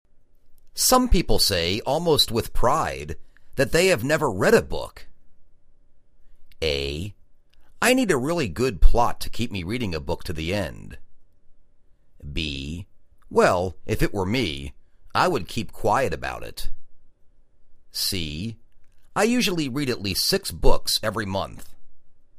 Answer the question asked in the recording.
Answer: Well, if it were me, I would keep quiet about it.